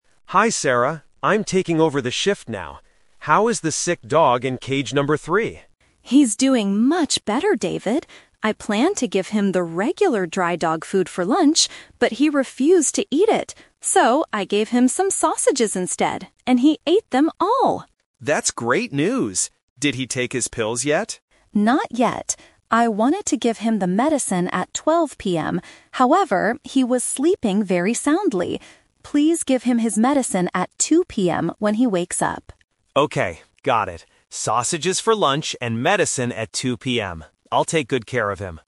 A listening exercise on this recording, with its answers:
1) What did the dog in cage 3 actually eat for lunch?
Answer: Sausages.

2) Why didn't Sarah give the dog its medicine earlier?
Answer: Because the dog was sleeping.

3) What time does David need to give the dog its medicine?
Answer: 2:00 PM.

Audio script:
David: Hi Sarah, I'm taking over the shift now. How is the sick dog in cage number three?
Sarah: He's doing much better, David. I planned to give him the regular dry dog food for lunch. But he refused to eat it. So, I gave him some sausages instead, and he ate them all!
David: That's great news! Did he take his pills yet?
Sarah: Not yet. I wanted to give him the medicine at 12:00 PM, however, he was sleeping very soundly. Please give him his medicine at 2:00 PM when he wakes up.
David: Okay, got it. Sausages for lunch and medicine at 2:00 PM. I'll take good care of him.